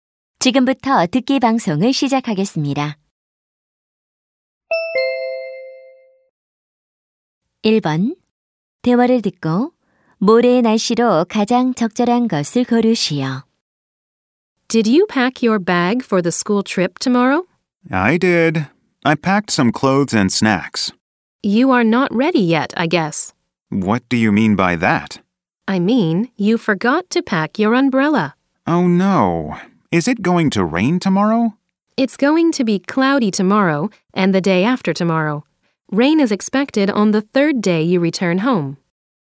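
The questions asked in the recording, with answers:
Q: 대화를 듣고 모레의 날씨로 가장 적절한 것을 고르시오.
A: 흐림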